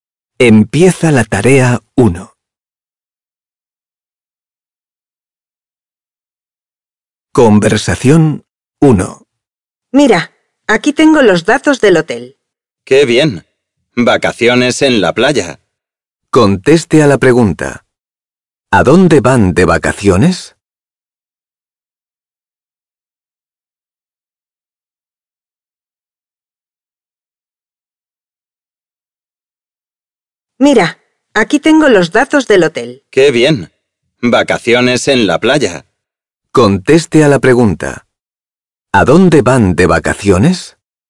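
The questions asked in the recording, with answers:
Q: ¿A dónde van de vacaciones?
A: A la playa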